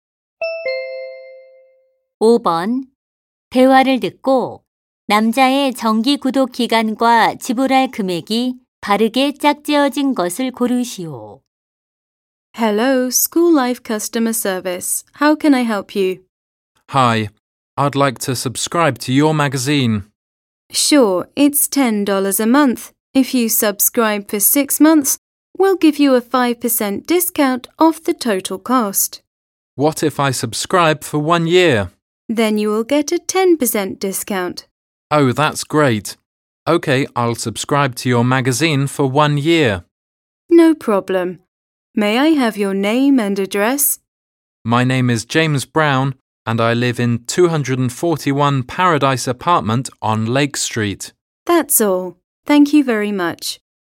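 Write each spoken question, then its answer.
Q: 대화를 듣고 남자의 정기 구독 기간과 지불할 금액이 바르게 짝지어진 것을 고르시오.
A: 1년, 108달러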